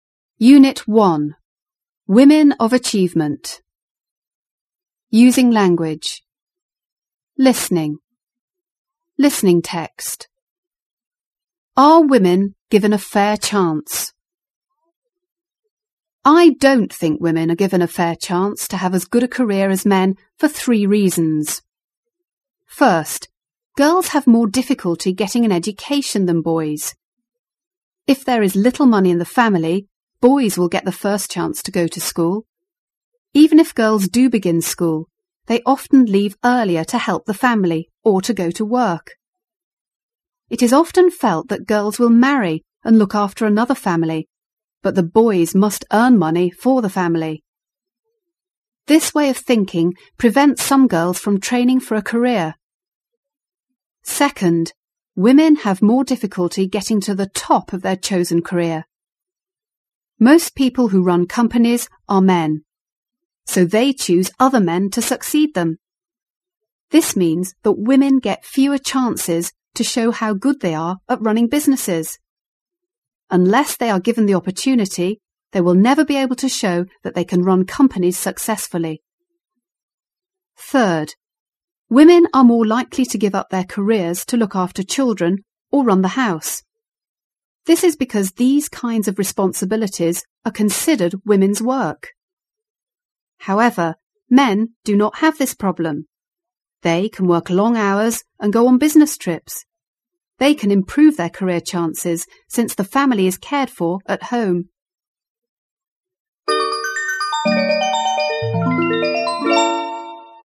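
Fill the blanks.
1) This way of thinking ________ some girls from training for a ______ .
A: prevents; career

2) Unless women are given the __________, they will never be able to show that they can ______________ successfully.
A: opportunity; run companies

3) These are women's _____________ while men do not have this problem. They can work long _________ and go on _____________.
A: responsibilities; hours; business trips

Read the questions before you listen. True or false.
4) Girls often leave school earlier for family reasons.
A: True

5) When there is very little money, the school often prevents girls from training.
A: False

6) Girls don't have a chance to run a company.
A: False

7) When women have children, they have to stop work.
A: False

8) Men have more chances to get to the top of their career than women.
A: True

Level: 高中英语必修四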